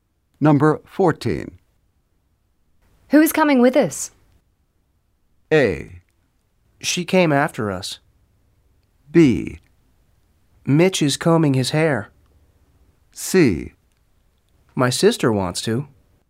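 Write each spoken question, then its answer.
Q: Who is coming with us?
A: C: My sister wants to.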